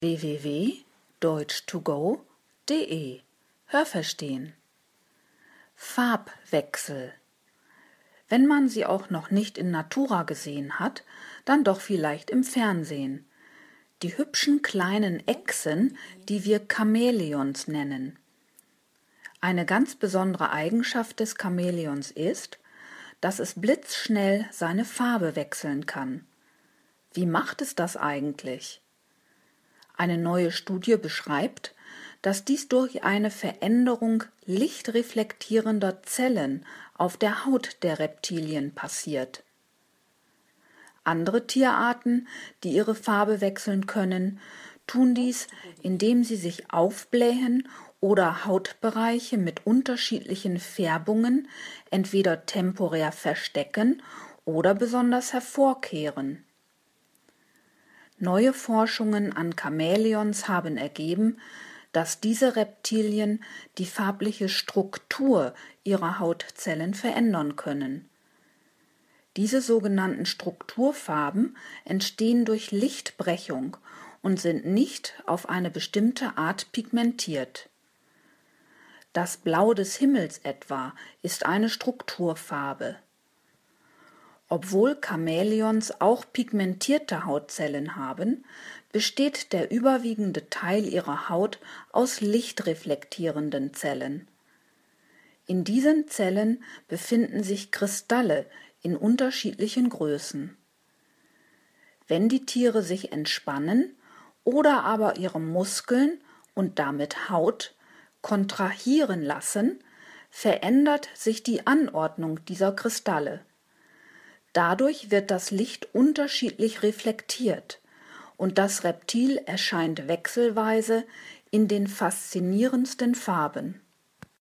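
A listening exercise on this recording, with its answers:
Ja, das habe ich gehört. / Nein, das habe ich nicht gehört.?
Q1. Chamäleons kann man nur im Fernsehen anschauen.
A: Nein, das habe ich nicht gehört.

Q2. Die Echsen, die man als Chamäleons bezeichnet, können sehr schnell ihr farbliches Aussehen verändern.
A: Ja, das habe ich gehört.

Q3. Es gibt auch andere Tiere, die ihre Farbe wechseln können.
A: Ja, das habe ich gehört.

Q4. Der Farbwechsel bei Tieren erfolgt durch eine Veränderung lichtreflektierender Zellen auf der Haut.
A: Nein, das habe ich nicht gehört.

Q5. Chamäleons können die farbliche Struktur ihrer Hautzellen in verschiedenen Farben erscheinen lassen.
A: Ja, das habe ich gehört.

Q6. Die sogenannten Strukturfarben haben eine besondere Pigmentierung.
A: Nein, das habe ich nicht gehört.

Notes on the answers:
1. Aber wenn man sie noch nicht in natura gesehen hat, dann vielleicht im Fernsehen.
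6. Sie sind nicht pigmentiert, sondern entstehen durch Lichtbrechung, wie etwa das Blau des Himmels.

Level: C2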